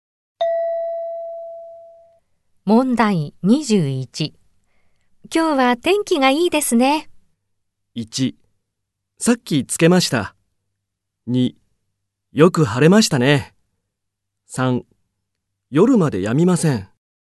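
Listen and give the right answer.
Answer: 2: よく晴れましたね。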